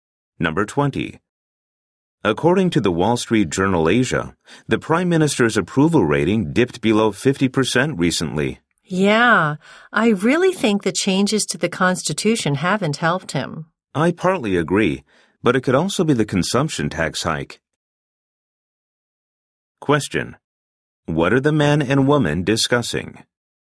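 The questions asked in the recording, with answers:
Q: What are the man and woman discussing?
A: The Prime Minister's falling approval rating.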